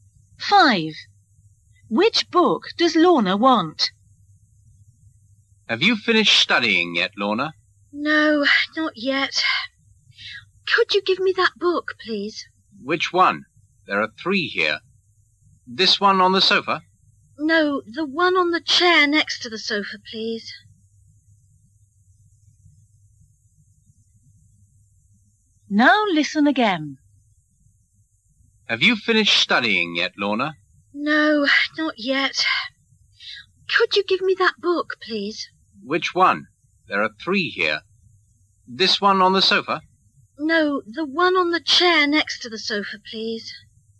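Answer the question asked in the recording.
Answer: The one on the chair next to the sofa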